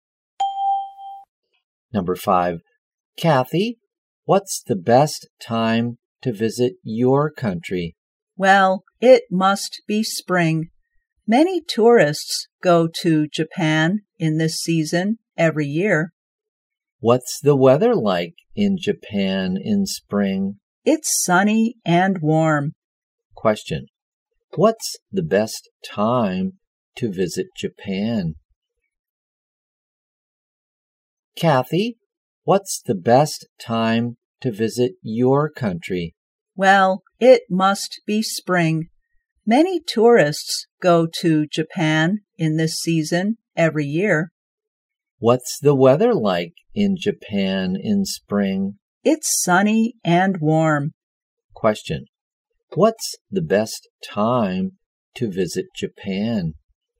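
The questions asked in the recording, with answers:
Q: Question, what's the best time to visit Japan?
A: Spring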